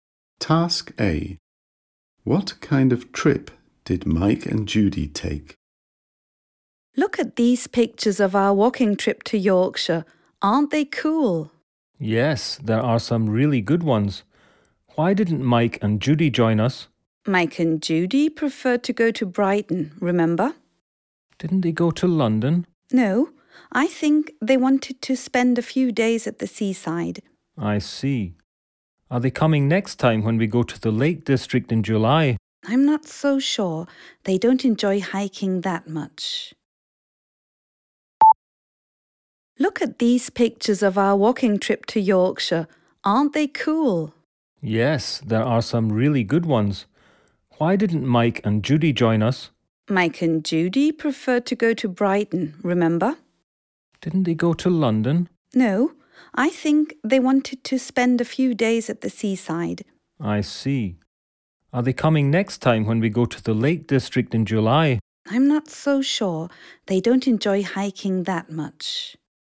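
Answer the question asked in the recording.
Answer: A few days at the seaside (in Brighton)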